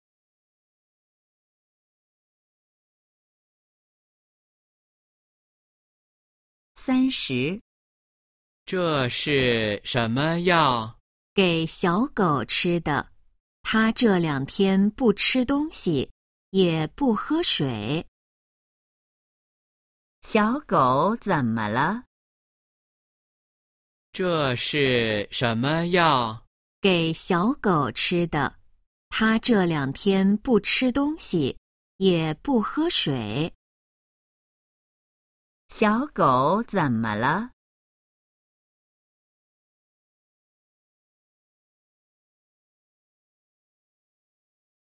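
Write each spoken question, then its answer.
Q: 小狗怎么了?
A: 不吃东西,也不喝水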